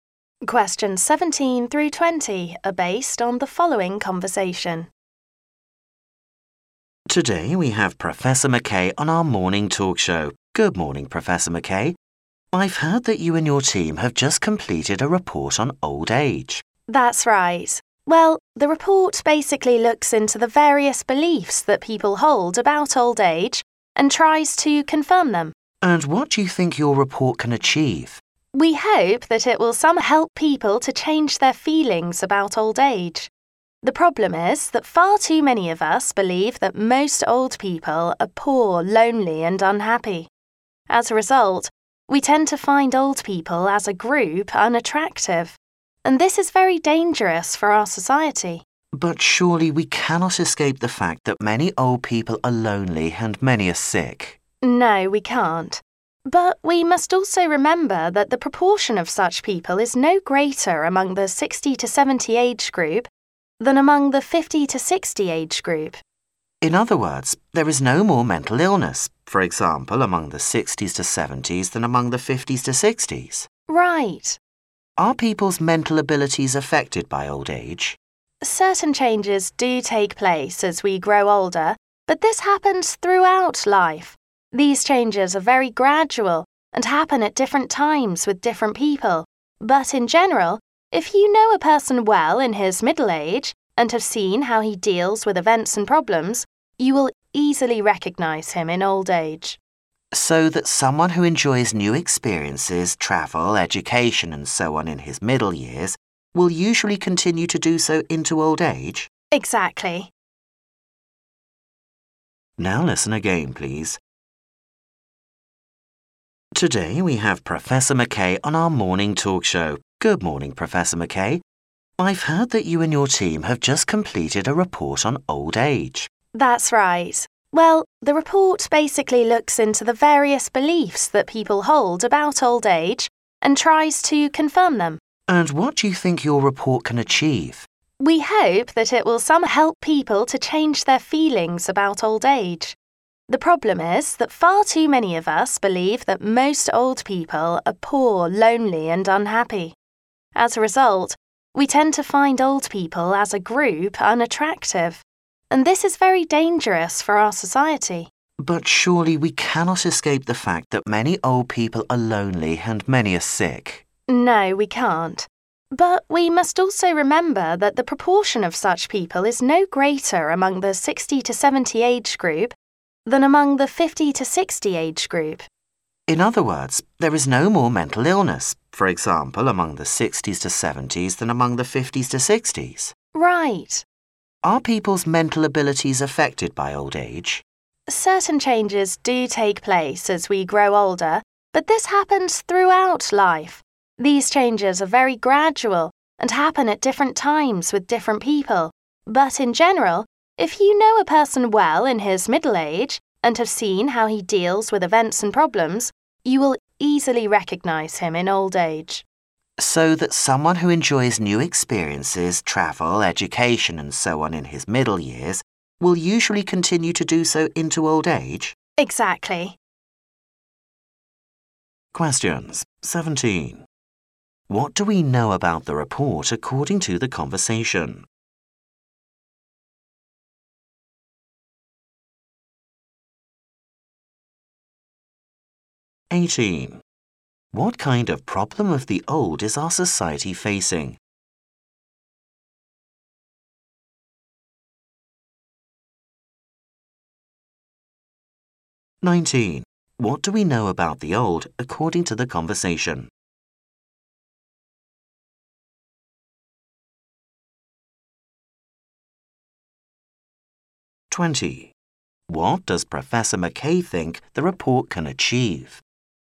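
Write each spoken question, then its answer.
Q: What do we know about the report according to the conversation?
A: It looks into people's beliefs about old age and tries to confirm them.

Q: What kind of problem of the old is our society facing?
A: People believe old people are poor, lonely and unhappy, so they find them unattractive.

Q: What does Professor McKay think the report can achieve?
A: Help people change their feelings about old age.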